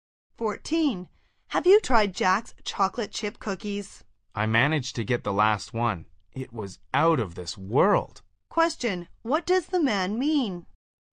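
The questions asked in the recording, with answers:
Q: What does the man mean?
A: The cookie was delicious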